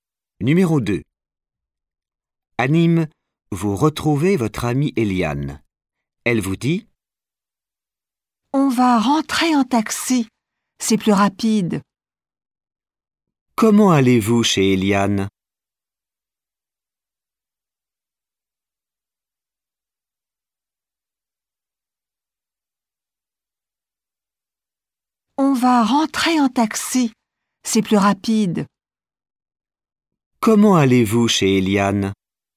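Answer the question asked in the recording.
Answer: En taxi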